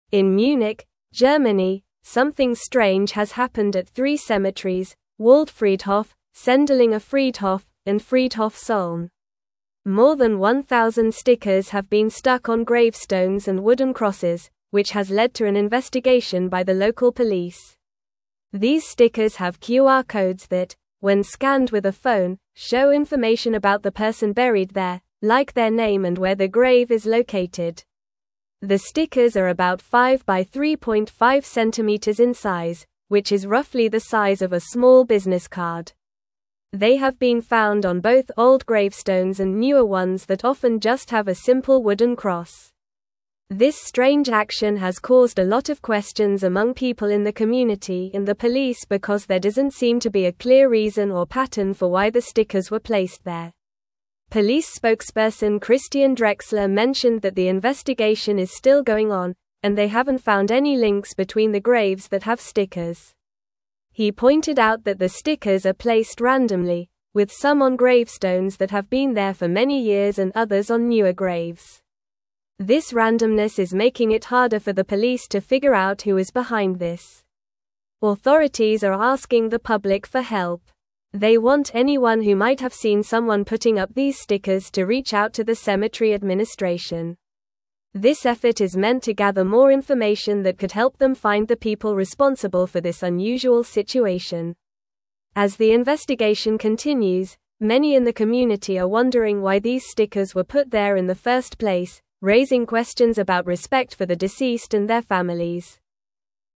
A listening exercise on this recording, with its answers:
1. In Munich, Germany, something (1)______ has happened at three cemeteries: Waldfriedhof, Sendlinger Friedhof, and Friedhof (2)______.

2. In Munich, Germany, something (1)______ has happened at three cemeteries: Waldfriedhof, Sendlinger Friedhof, and Friedhof (2)______.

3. More than 1,000 stickers have been (3)______ on gravestones and wooden crosses, which has led to an investigation by the local police.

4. These stickers have QR (4)______ that, when scanned with a phone, show information about the person buried there, like their name and where their grave is located.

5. They have been found on both old gravestones and newer ones that often just have a (5)______ wooden cross.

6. This strange action has (6)______ a lot of (7)______ among people in the community and the police because there doesn't seem to be a clear (8)______ or pattern for why the stickers were placed there.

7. This strange action has (6)______ a lot of (7)______ among people in the community and the police because there doesn't seem to be a clear (8)______ or pattern for why the stickers were placed there.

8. This strange action has (6)______ a lot of (7)______ among people in the community and the police because there doesn't seem to be a clear (8)______ or pattern for why the stickers were placed there.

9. Police spokesperson Christian Drexler mentioned that the investigation is still (9)______ on, and they haven't found any links between the graves that have stickers.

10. He pointed out that the stickers are (10)______ randomly, with some on (11)______ that have been there for many years and others on newer graves.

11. He pointed out that the stickers are (10)______ randomly, with some on (11)______ that have been there for many years and others on newer graves.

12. (12)______ are asking the public for help.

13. They want anyone who might have seen someone putting up these stickers to (13)______ out to the cemetery administration.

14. This (14)______ is (15)______ to gather more information that could help them find the people (16)______ for this unusual situation.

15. This (14)______ is (15)______ to gather more information that could help them find the people (16)______ for this unusual situation.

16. This (14)______ is (15)______ to gather more information that could help them find the people (16)______ for this unusual situation.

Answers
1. strange
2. Solln
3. stuck
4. codes
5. simple
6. caused
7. questions
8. reason
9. going
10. placed
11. gravestones
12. Authorities
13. reach
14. effort
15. meant
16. responsible

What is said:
In Munich, Germany, something strange has happened at three cemeteries: Waldfriedhof, Sendlinger Friedhof, and Friedhof Solln. More than 1,000 stickers have been stuck on gravestones and wooden crosses, which has led to an investigation by the local police. These stickers have QR codes that, when scanned with a phone, show information about the person buried there, like their name and where their grave is located.
The stickers are about 5×3.5 centimeters in size, which is roughly the size of a small business card. They have been found on both old gravestones and newer ones that often just have a simple wooden cross. This strange action has caused a lot of questions among people in the community and the police because there doesn't seem to be a clear reason or pattern for why the stickers were placed there.
Police spokesperson Christian Drexler mentioned that the investigation is still going on, and they haven't found any links between the graves that have stickers. He pointed out that the stickers are placed randomly, with some on gravestones that have been there for many years and others on newer graves. This randomness is making it harder for the police to figure out who is behind this.
Authorities are asking the public for help. They want anyone who might have seen someone putting up these stickers to reach out to the cemetery administration. This effort is meant to gather more information that could help them find the people responsible for this unusual situation. As the investigation continues, many in the community are wondering why these stickers were put there in the first place, raising questions about respect for the deceased and their families.

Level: Level 3